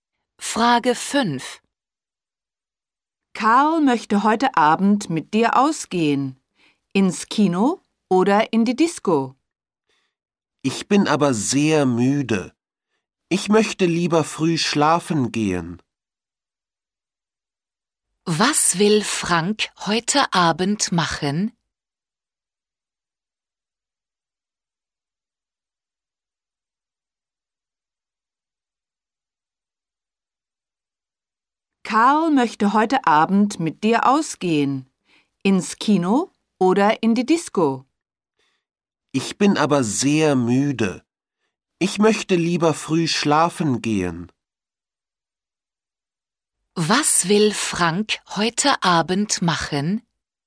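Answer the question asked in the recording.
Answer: Früh schlafen gehen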